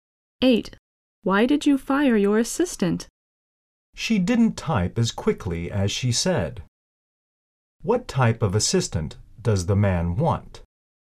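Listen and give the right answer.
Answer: One who can type quickly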